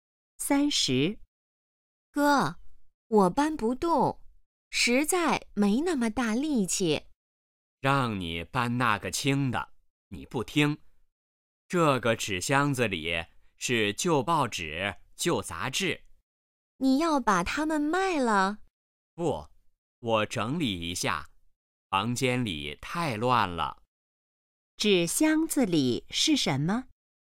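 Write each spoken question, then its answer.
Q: 纸箱子里是什么?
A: 旧报纸、旧杂志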